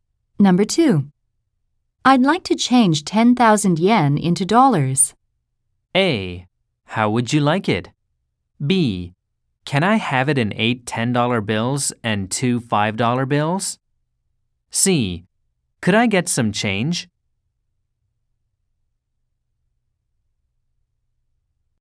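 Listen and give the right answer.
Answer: A: How would you like it?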